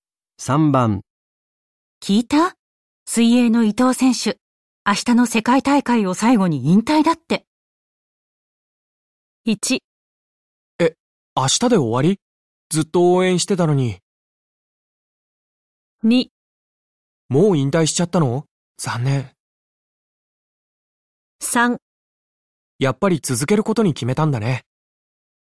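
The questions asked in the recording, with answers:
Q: 聞いた?水泳の伊藤選手、明日の世界大会を最後に引退だって。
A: 1: 明日で終わり?ずっと応援してたのに。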